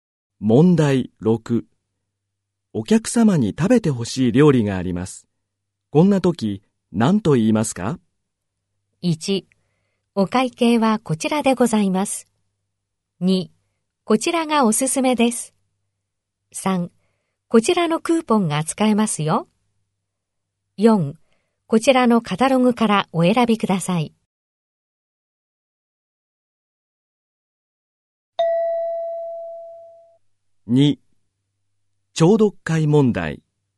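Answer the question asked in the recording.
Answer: 2: こちらがおすすめです。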